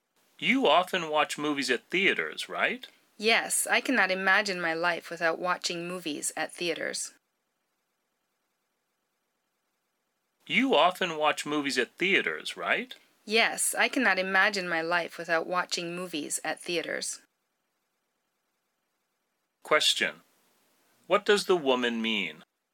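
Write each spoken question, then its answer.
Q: What does the woman mean?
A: She loves watching movies at theaters and often does it.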